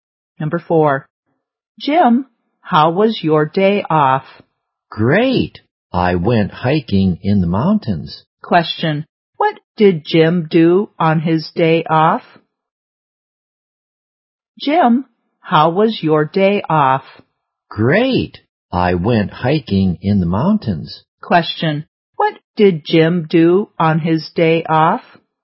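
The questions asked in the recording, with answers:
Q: what did Jim do on his day off?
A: He went hiking in the mountains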